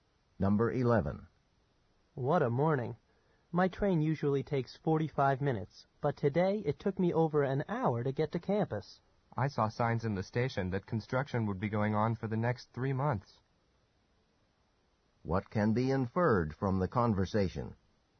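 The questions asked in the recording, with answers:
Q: What can be inferred from the conversation?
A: Construction will delay the trains for three months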